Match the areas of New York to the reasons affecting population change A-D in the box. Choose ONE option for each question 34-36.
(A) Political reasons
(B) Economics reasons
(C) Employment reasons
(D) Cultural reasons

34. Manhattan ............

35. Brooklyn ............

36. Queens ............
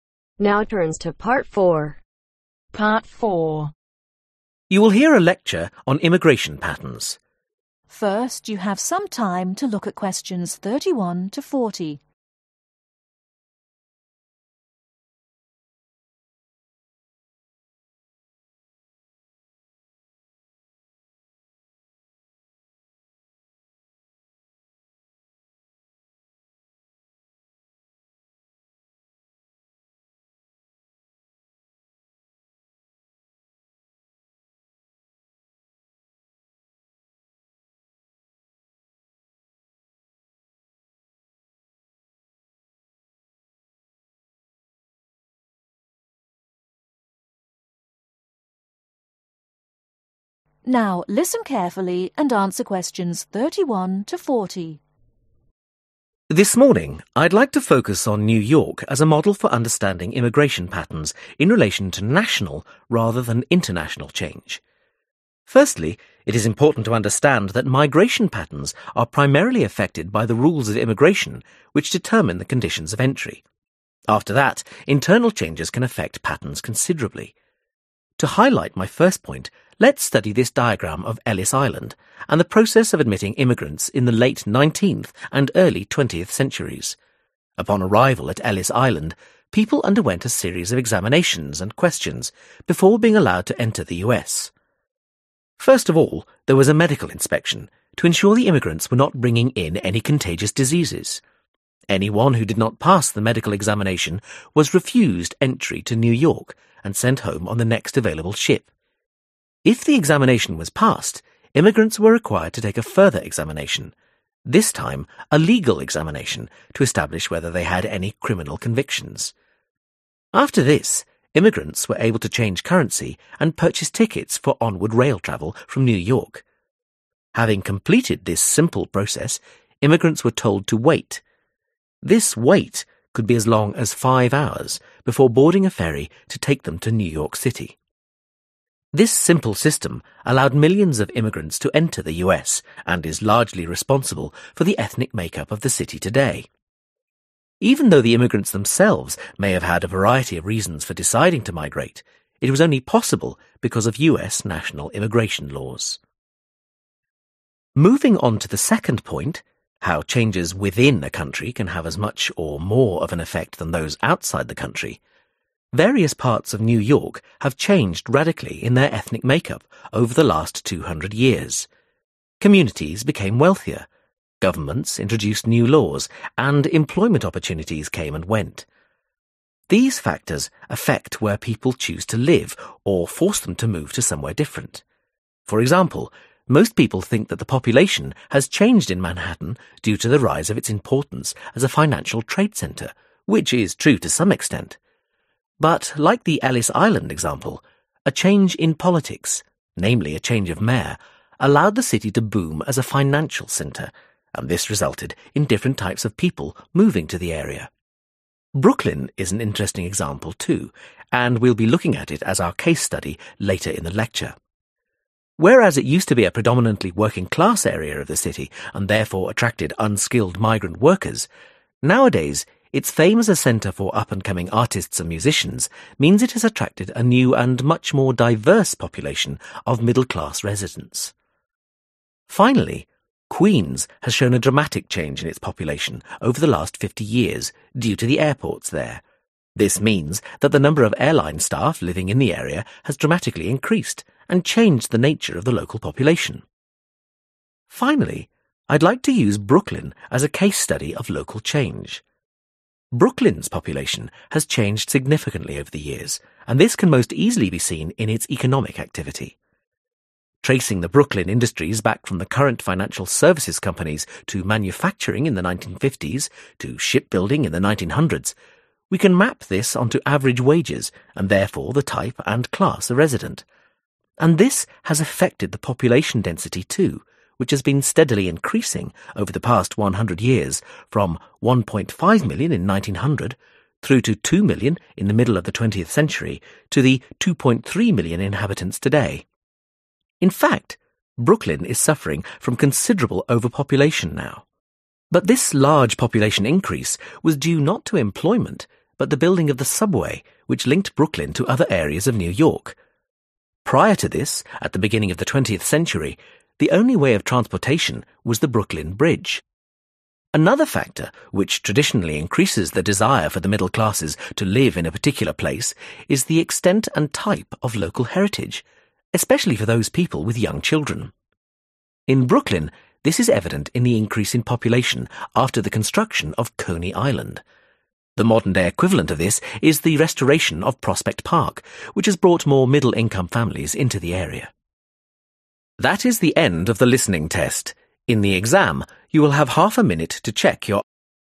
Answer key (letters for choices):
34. A
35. D
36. C